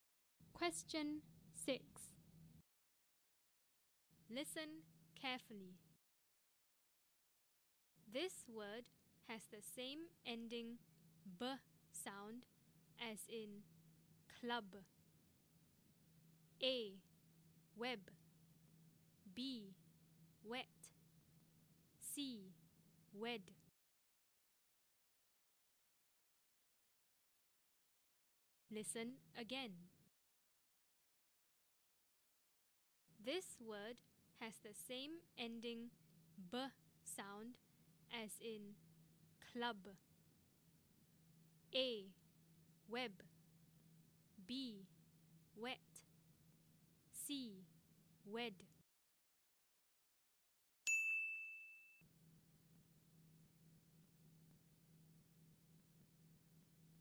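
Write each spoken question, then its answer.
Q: This word has the same ending b sound as in club.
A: A: Web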